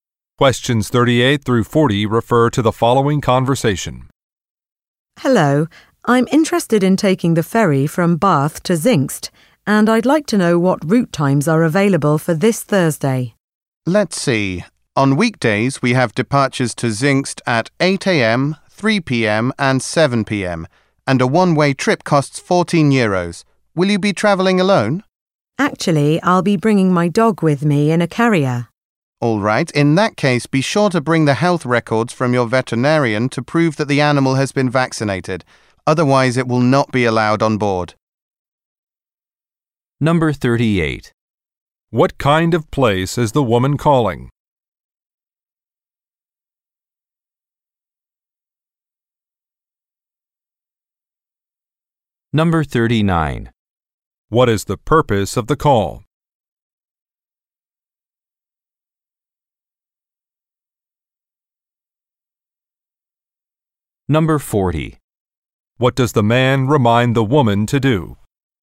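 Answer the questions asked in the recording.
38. A ferry company
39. To ask about departure times
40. Bring her dog's vaccination records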